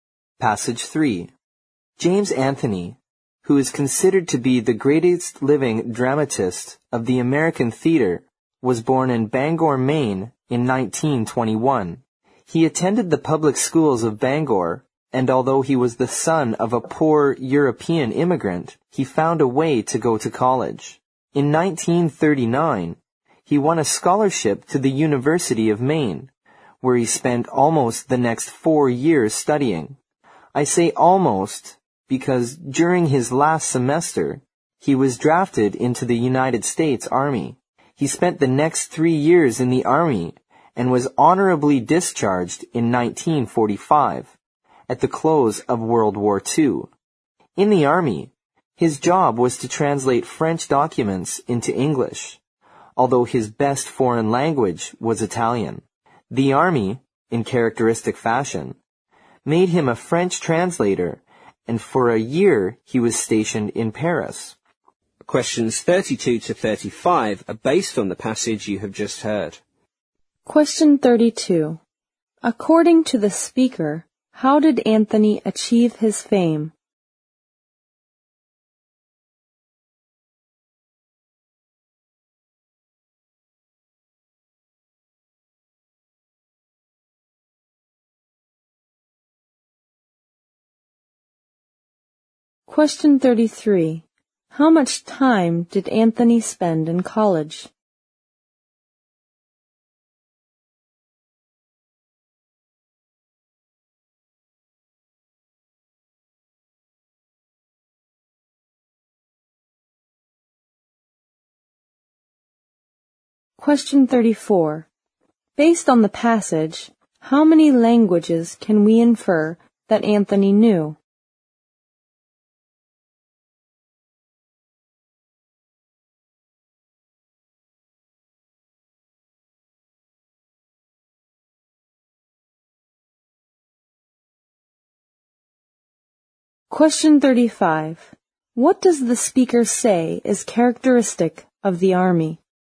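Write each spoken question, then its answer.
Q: How much time did Anthony spend in college?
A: Almost 4 years

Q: Based on the passage, how many languages can we infer that Anthony knew?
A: Three (English, French and Italian)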